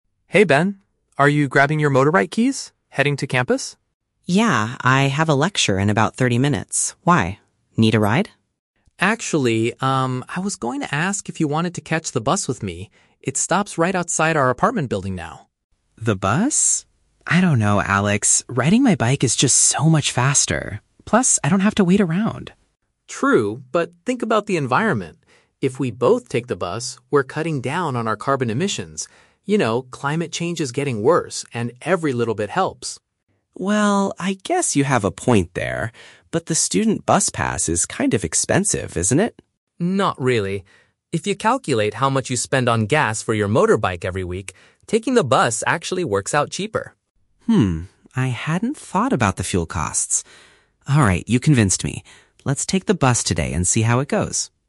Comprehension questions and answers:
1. Why does Alex suggest taking the bus?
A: To lower their impact on the environment.

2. What is Ben's initial objection to taking the bus?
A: He thinks public transport wastes his time.

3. What finally convinces Ben to try the bus?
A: He realizes he can save money on fuel.

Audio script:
Alex: Hey, Ben. Are you grabbing your motorbike keys? Heading to campus?
Ben: Yeah, I have a lecture in about thirty minutes. Why? Need a ride?
Alex: Actually, um, I was going to ask if you wanted to catch the bus with me. It stops right outside our apartment building now.
Ben: The bus? I don't know, Alex. Riding my bike is just so much faster. Plus, I don't have to wait around.
Alex: True, but think about the environment! If we both take the bus, we're cutting down on our carbon emissions. You know, climate change is getting worse, and every little bit helps.
Ben: Well, I guess you have a point there. But the student bus pass is kind of expensive, isn't it?
Alex: Not really. If you calculate how much you spend on gas for your motorbike every week, taking the bus actually works out cheaper.
Ben: Hmm, I hadn't thought about the fuel costs. Alright, you convinced me. Let's take the bus today and see how it goes.